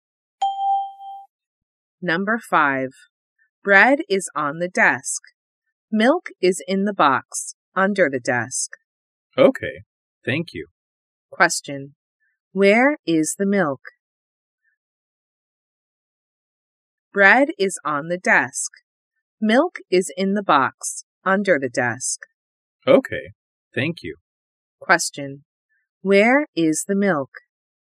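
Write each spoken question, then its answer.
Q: Where is the milk?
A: In the box, under the desk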